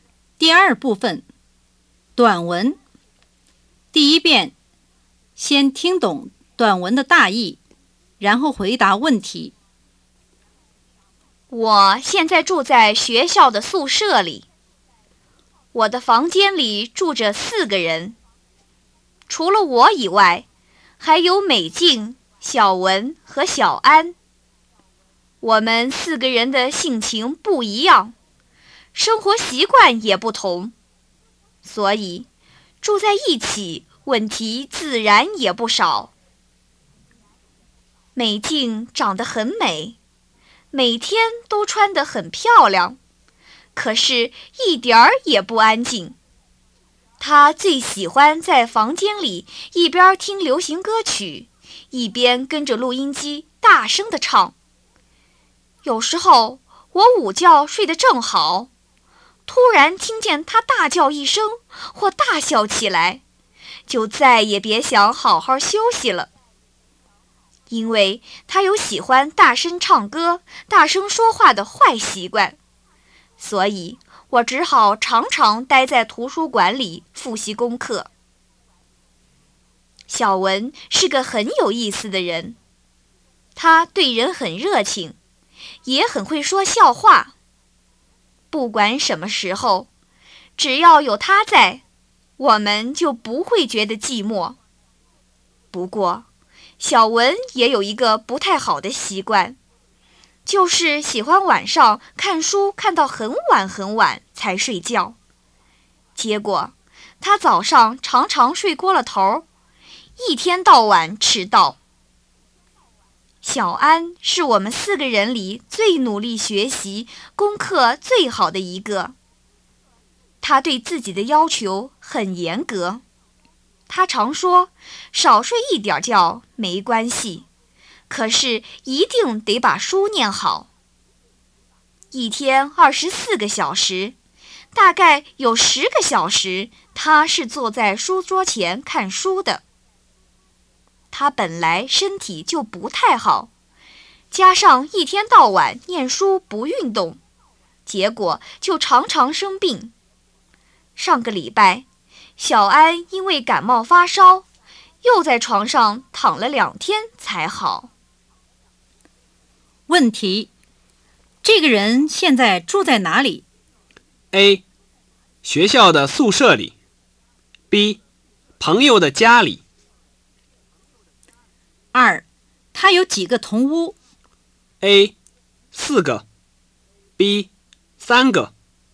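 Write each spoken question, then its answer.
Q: 这个人现在住在哪里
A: A: 学校的宿舍里

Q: 他有几个同屋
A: B: 3个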